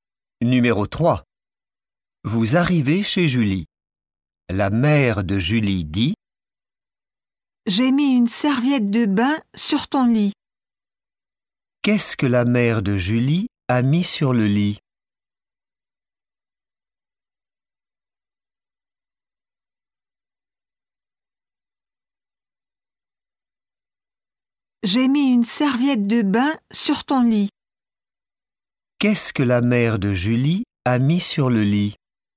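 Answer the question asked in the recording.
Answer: Une serviette de bain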